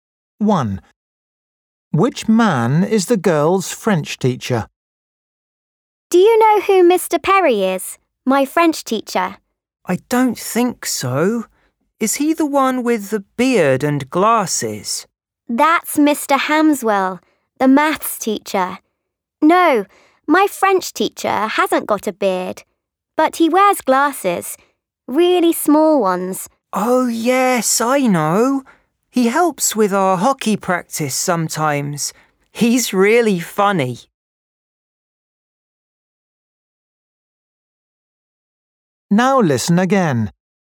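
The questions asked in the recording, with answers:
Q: Which man is the girl's French teacher?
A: the one with small glasses and no beard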